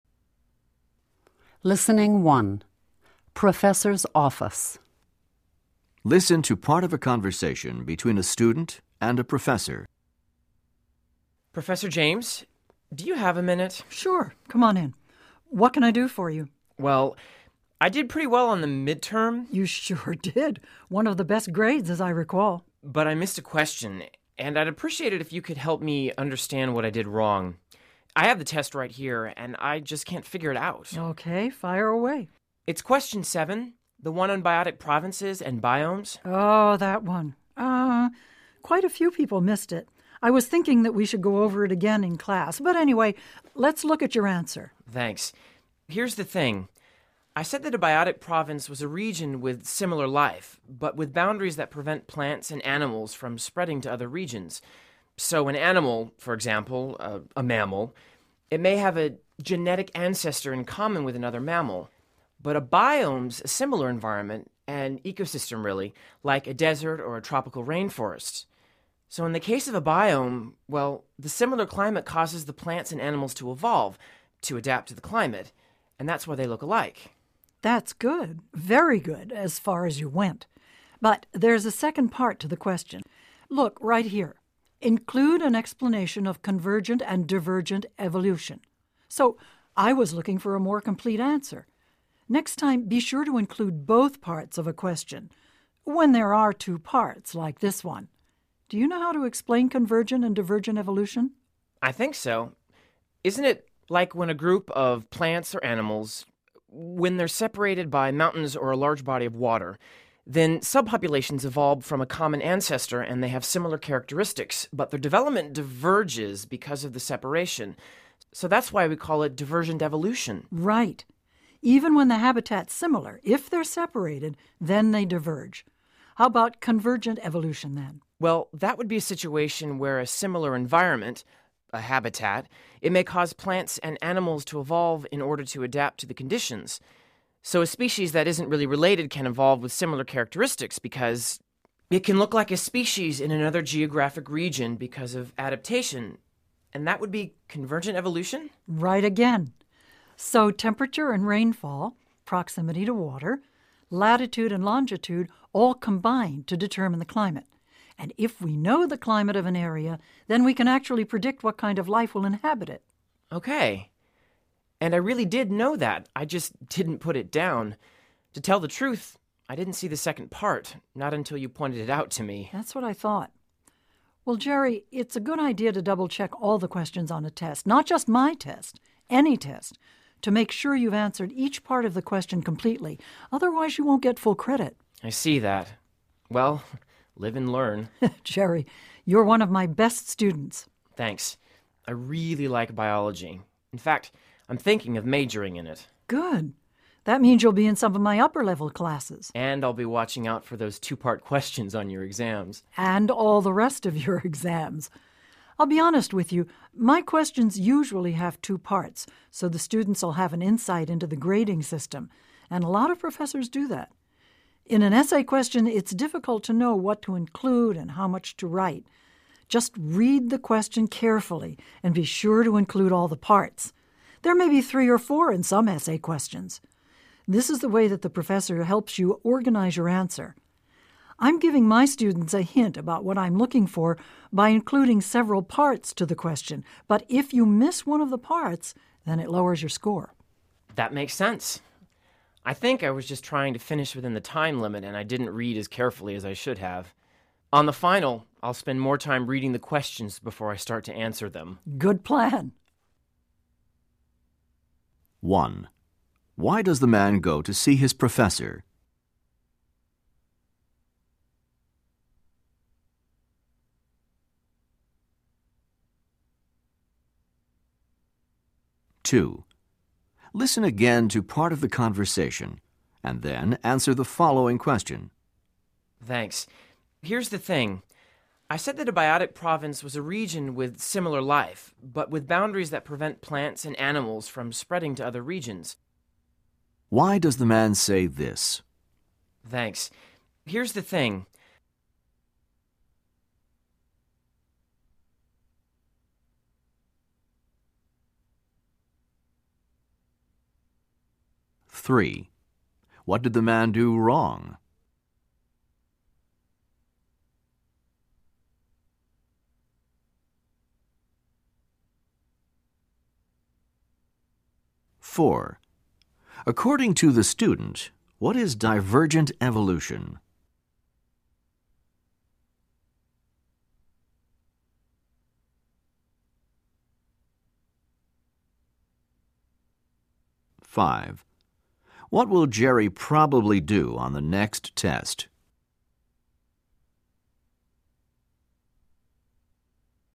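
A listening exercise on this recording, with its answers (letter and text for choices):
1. Why does the man go to see his professor?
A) To prepare for the next midterm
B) To clarify a question from the midterm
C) To find out his grade on the midterm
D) To complain about his grade on the midterm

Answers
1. B) To clarify a question from the midterm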